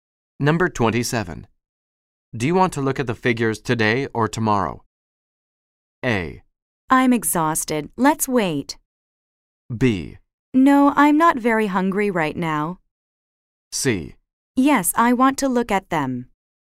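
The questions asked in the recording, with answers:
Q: Do you want to look at the figures today or tomorrow?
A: A: I'm exhausted. Let's wait.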